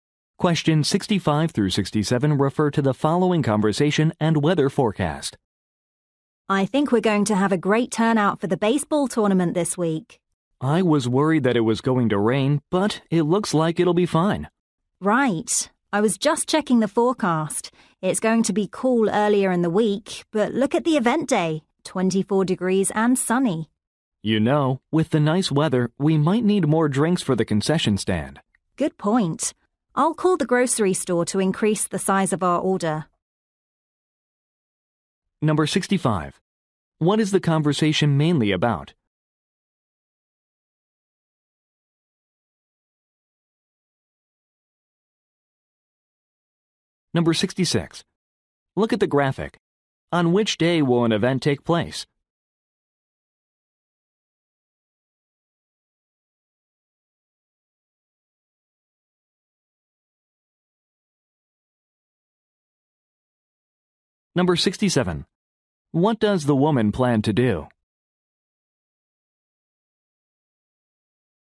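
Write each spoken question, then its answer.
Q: What is the conversation mainly about?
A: A baseball tournament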